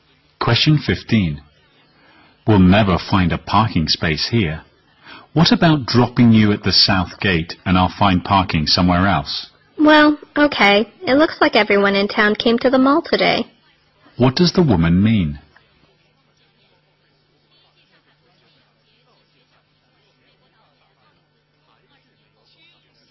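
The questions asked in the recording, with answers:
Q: What does the woman mean?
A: The mall is very crowded today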